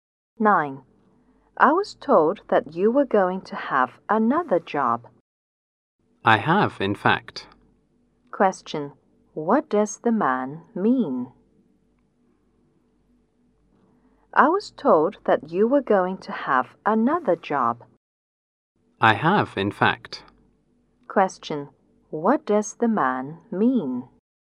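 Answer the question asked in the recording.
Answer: He does have another job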